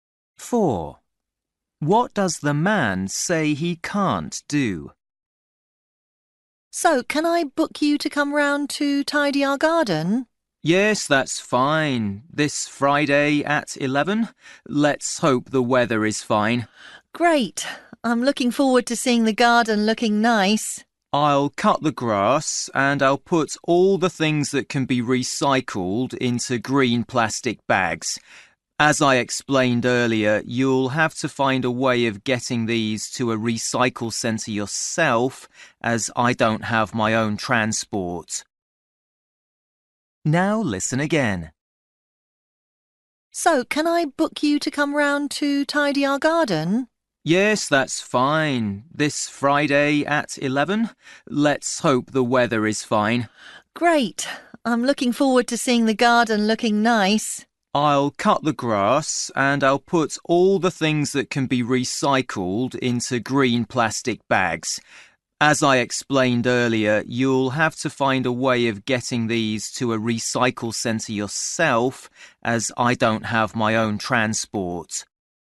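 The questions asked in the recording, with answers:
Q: What does the man say he can't do?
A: Take the recycling bags to the recycling centre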